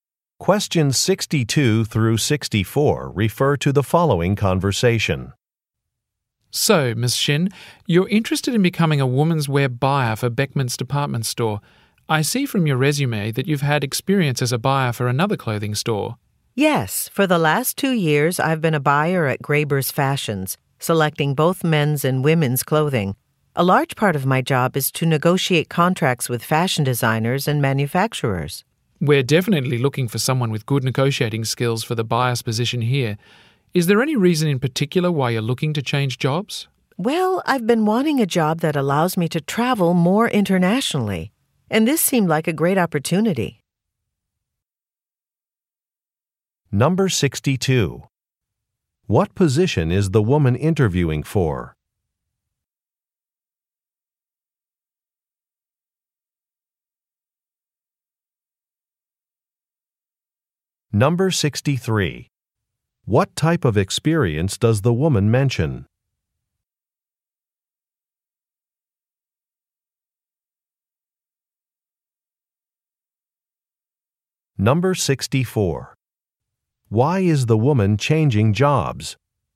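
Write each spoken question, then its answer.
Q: What position is the woman interviewing for?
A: Women's wear buyer

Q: What type of experience does the woman mention?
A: Negotiating contracts with designers and manufacturers

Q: Why is the woman changing jobs?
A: She wants to travel internationally more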